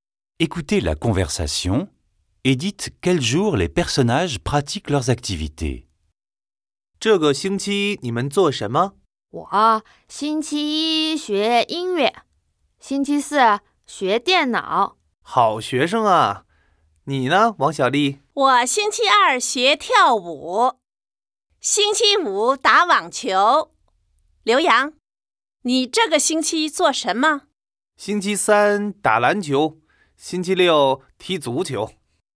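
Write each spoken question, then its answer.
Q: Écoutez la conversation et dites quel jour les personnages pratiquent leurs activités.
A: Premier élève : musique lundi, informatique jeudi ; Wang Xiaoli : danse mardi, tennis vendredi ; Liu Yang : basket mercredi, football samedi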